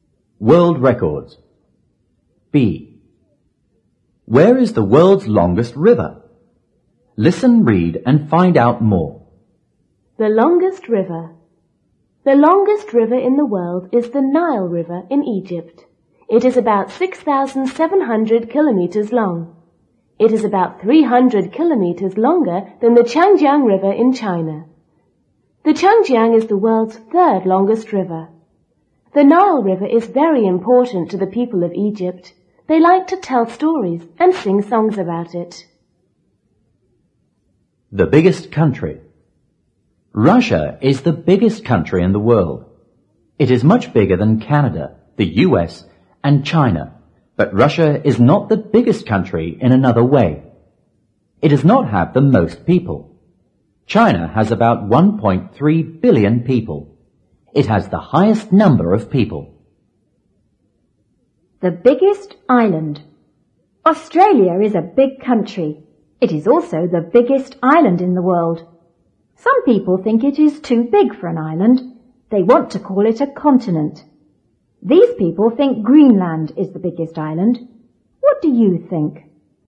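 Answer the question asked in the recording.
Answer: In Egypt (the Nile River)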